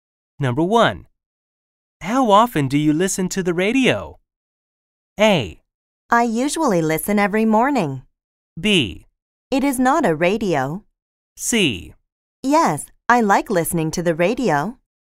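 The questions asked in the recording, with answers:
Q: How often do you listen to the radio?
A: A: I usually listen every morning.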